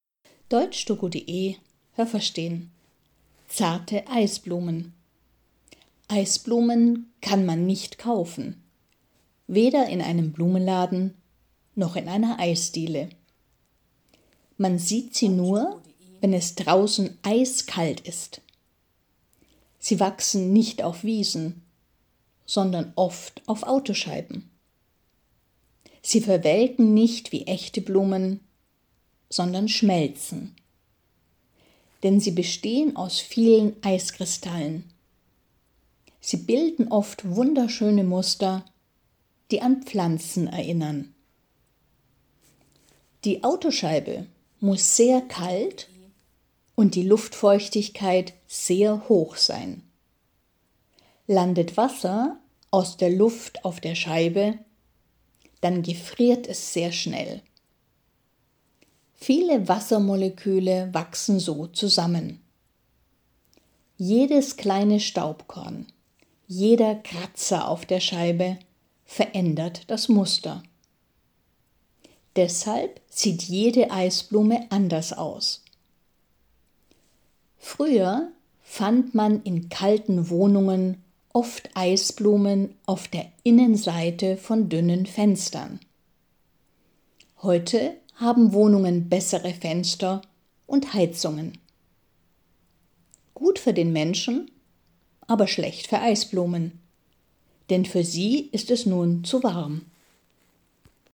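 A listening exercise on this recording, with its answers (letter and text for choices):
Was haben Sie gehört? Es gibt nur eine korrekte Antwort.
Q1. Eisblumen kann man ...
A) nur noch in Eisdielen kaufen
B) nicht kaufen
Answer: B) nicht kaufen

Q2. Eisblumen wachsen ...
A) nur, wenn es sehr kalt ist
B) nur auf Wiesen und Autoscheiben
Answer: A) nur, wenn es sehr kalt ist

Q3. Eisblumen ...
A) bestehen aus Eiscreme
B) bestehen aus Eiskristallen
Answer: B) bestehen aus Eiskristallen

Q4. Eisblumen bilden sich auf Autoscheiben, ...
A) wenn die Autoscheibe hoch und die Luftfeuchtigkeit kalt ist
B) wenn die Autoscheibe kalt und die Luftfeuchtigkeit hoch ist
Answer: B) wenn die Autoscheibe kalt und die Luftfeuchtigkeit hoch ist

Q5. Wenn Wasser aus der Luft auf der kalten Scheibe landet, ...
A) dann verändern sich Staubkorn und Kratzer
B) dann gefriert das Wasser sehr schnell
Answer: B) dann gefriert das Wasser sehr schnell

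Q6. Jede Eisblume ...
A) sieht anders aus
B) sieht wie die andere aus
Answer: A) sieht anders aus

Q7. In Wohnungen: Eisblumen wachsen innen an Fenstern, ...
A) wenn die Fenster dünn sind und die Wohnung kalt ist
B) wenn die Fenster dick sind und die Wohnung warm ist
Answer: A) wenn die Fenster dünn sind und die Wohnung kalt ist

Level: A2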